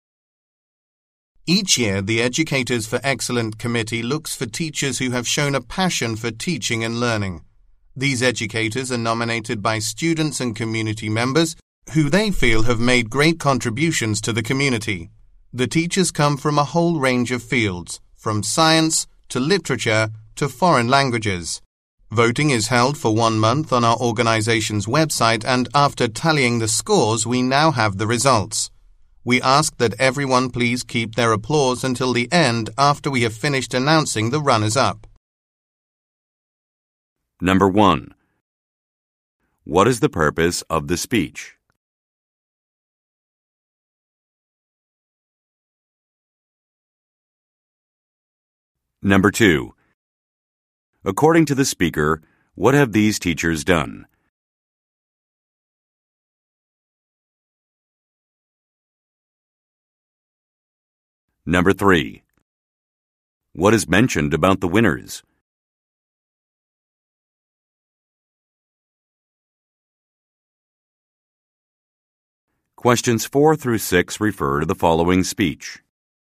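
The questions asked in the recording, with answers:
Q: What is the purpose of the speech?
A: To announce the results of the Educators for Excellence teacher awards

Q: According to the speaker, what have these teachers done?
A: Made great contributions to the community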